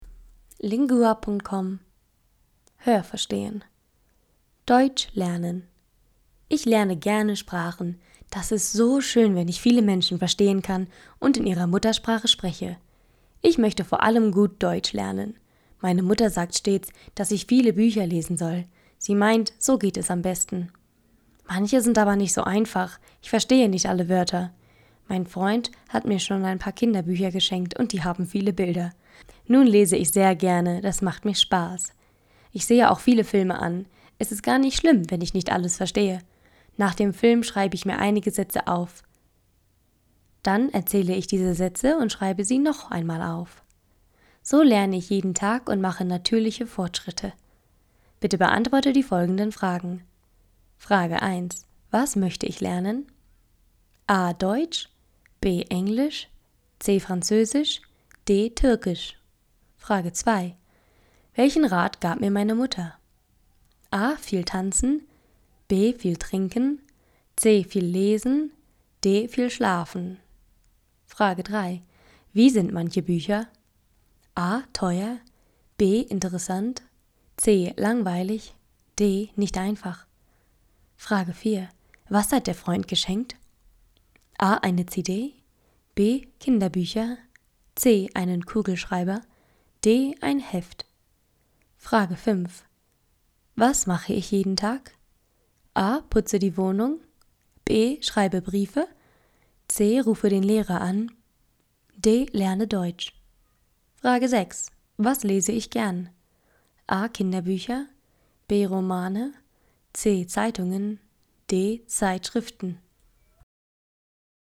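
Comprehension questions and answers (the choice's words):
Esercizio di comprensione del testo:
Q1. Was möchte ich lernen?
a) Deutsch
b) Englisch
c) Französisch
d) Türkisch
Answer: Deutsch

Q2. Welchen Rat gab mir meine Mutter?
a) Viel tanzen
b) Viel trinken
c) Viel lesen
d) Viel schlafen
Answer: Viel lesen

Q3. Wie sind manche Bücher?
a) Teuer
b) Interessant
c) langweilig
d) Nicht einfach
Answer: Nicht einfach

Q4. Was hat der Freund geschenkt?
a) Eine CD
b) Kinderbücher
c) Einen Kugelschreiber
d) Ein Heft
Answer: Kinderbücher

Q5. Was mache ich jeden Tag?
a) Putze die Wohnung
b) Schreibe Briefe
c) Rufe den Lehrer an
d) Lerne Deutsch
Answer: Lerne Deutsch

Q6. Was lese ich gern?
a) Kinderbücher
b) Romane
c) Zeitungen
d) Zeitschriften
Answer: Kinderbücher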